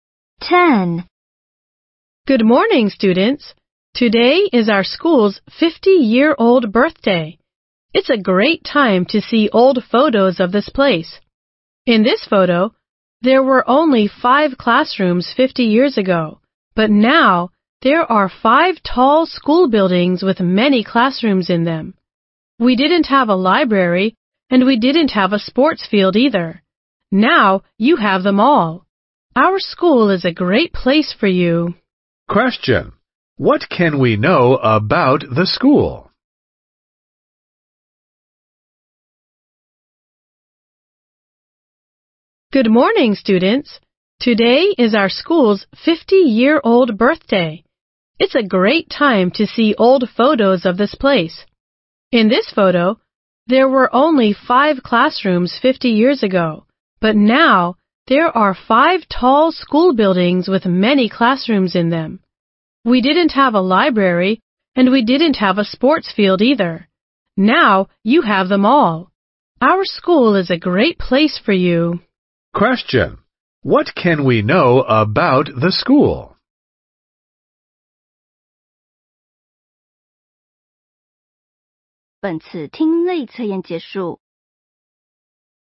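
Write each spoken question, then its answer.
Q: What can we know about the school?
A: It had only 5 classrooms and no library or sports field 50 years ago; now it has them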